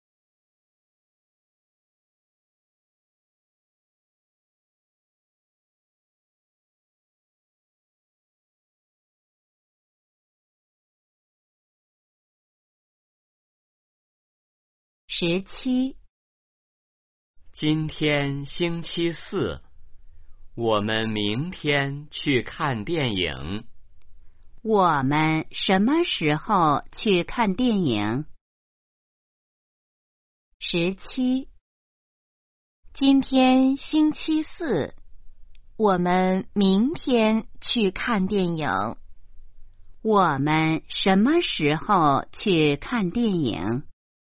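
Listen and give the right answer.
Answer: 明天(星期五)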